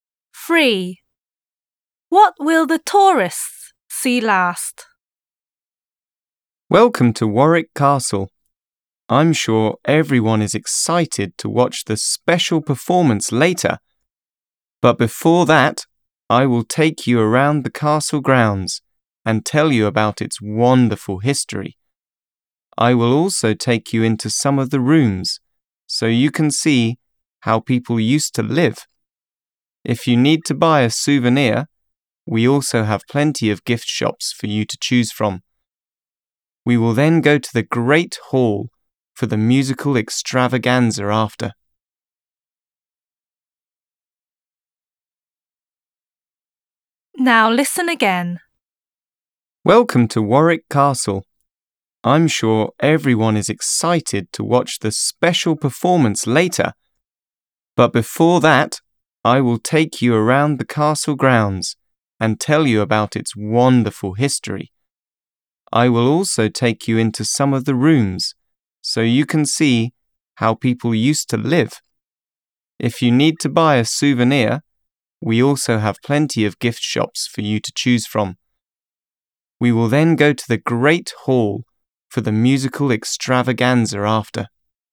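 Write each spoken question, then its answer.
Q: What will the tourists see last?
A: the musical performance in the Great Hall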